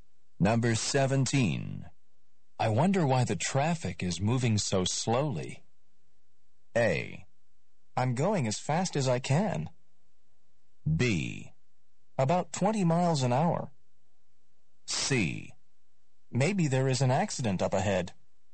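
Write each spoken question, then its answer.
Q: I wonder why the traffic is moving so slowly.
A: C: Maybe there is an accident up ahead.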